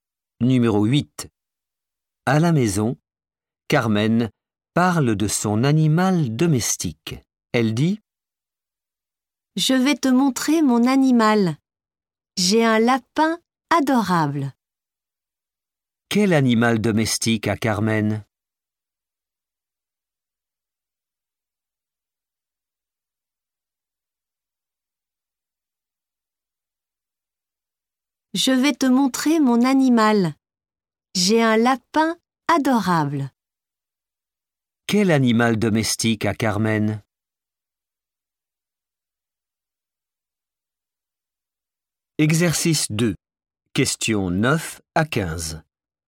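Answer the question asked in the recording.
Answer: Un lapin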